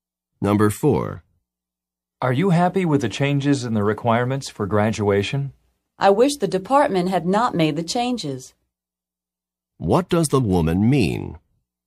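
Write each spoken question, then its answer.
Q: What does the woman mean?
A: The department made the changes, and she is not happy about them.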